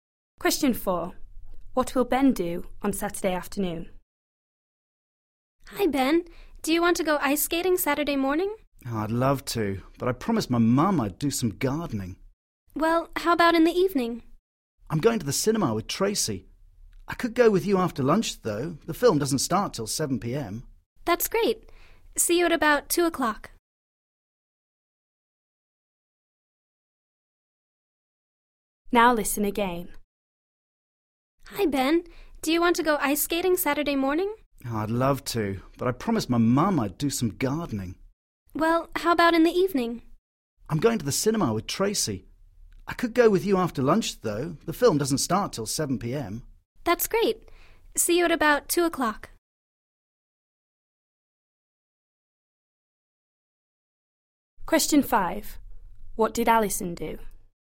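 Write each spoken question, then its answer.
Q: What will Ben do on Saturday afternoon?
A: Go ice skating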